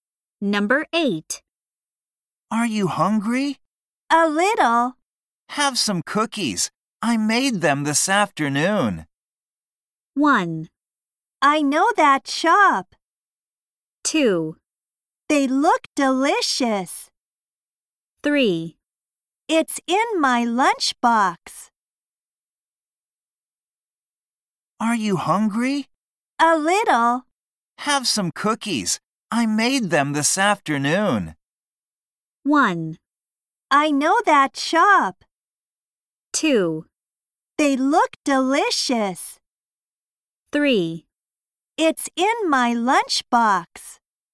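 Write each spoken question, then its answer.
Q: Have some cookies. I made them this afternoon.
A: 2: They look delicious.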